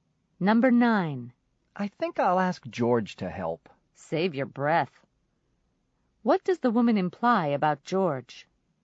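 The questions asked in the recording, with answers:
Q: What does the woman imply about George?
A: George won't help, so asking is useless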